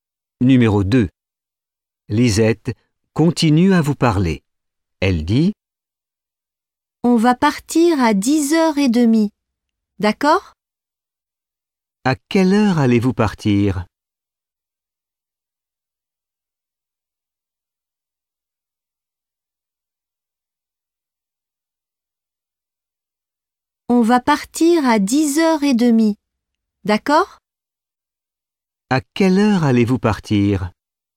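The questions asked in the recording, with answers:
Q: « À quelle heure allez-vous partir ? »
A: À 10h30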